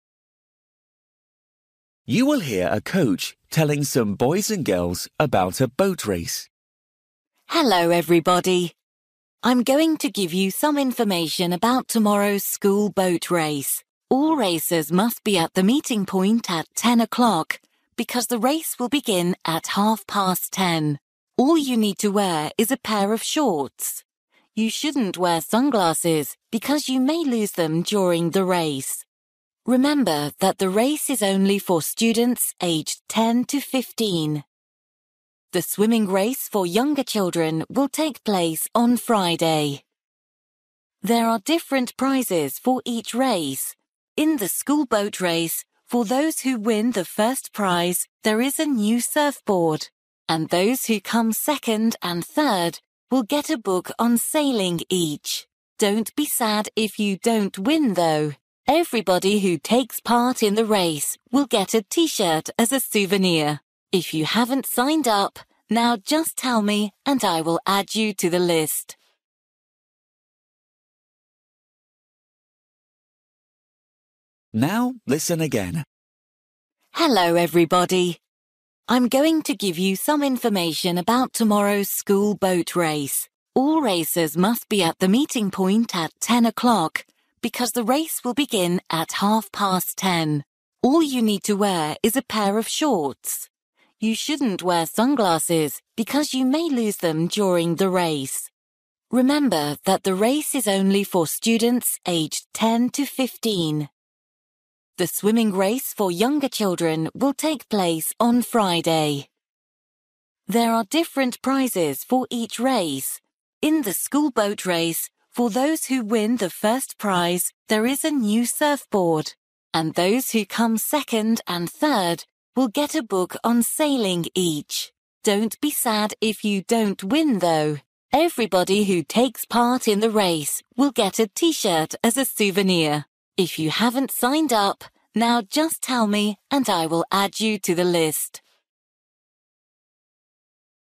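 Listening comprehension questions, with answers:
For each question, write the correct answer in the gap. Write one word or a number or a date or a time.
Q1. Staring time: (1)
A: 10:30

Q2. Clothes you need: (2)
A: shorts

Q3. Day of young children's race: (3)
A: Friday

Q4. First prize: (4)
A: surfboard

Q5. Souvenir for all students: (5)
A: t-shirt

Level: Luyện nghe trình độ A2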